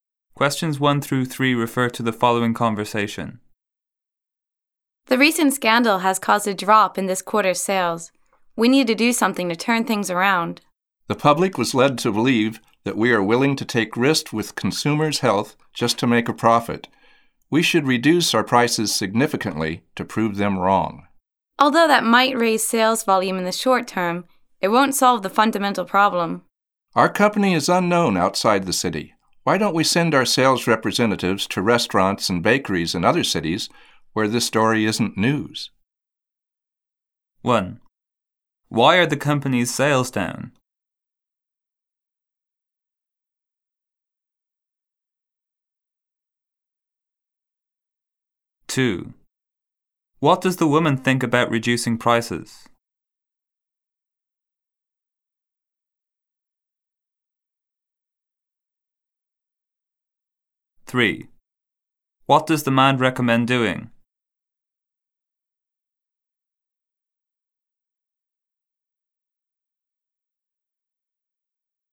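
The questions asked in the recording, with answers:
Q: Why are the company's sales down?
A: Because of a recent scandal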